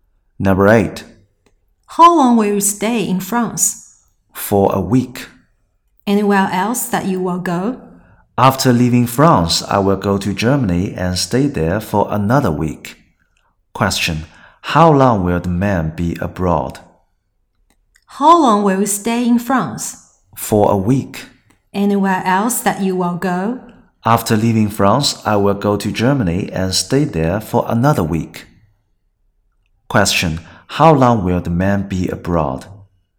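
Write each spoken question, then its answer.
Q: how long will the man be abroad?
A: Two weeks.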